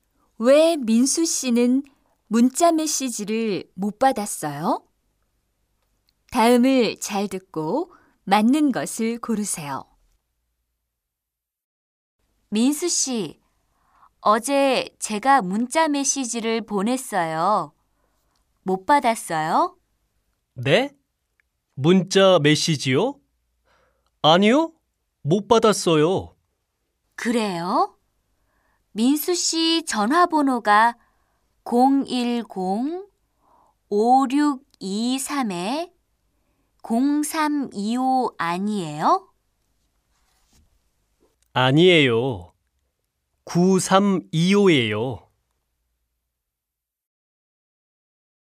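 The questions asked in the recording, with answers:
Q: 왜 민수 씨는 문자 메시지를 못 받았어요?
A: 전화번호가 틀려서요 (민수 씨 번호는 0325가 아니라 9325예요)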